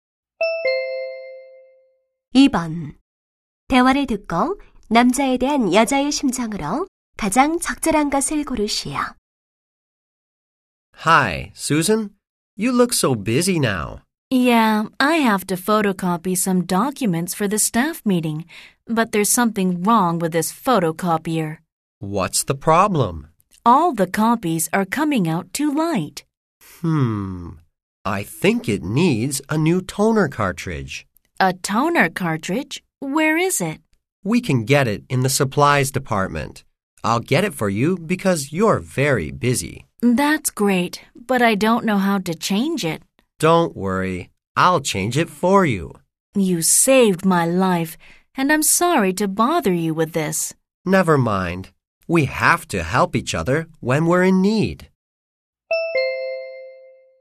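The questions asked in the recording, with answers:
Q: 대화를 듣고 남자에 대한 여자의 심정으로 가장 적절한 것을 고르시오.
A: 고마움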